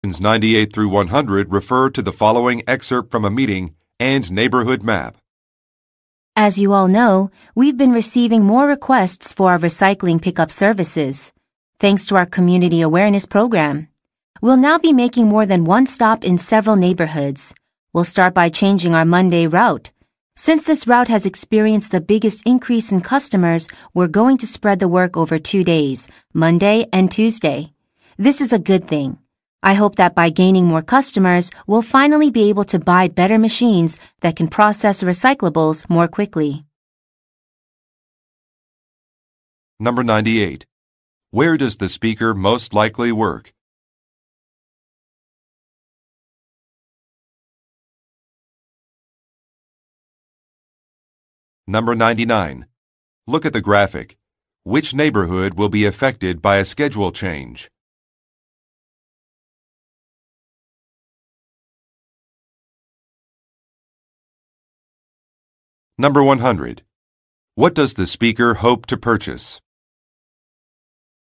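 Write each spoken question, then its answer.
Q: Where does the speaker most likely work?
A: At a recycling company

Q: What does the speaker hope to purchase?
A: Better machines that process recyclables more quickly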